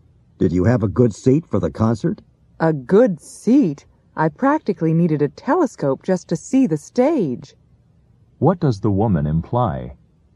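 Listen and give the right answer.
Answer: Her seat was very far from the stage.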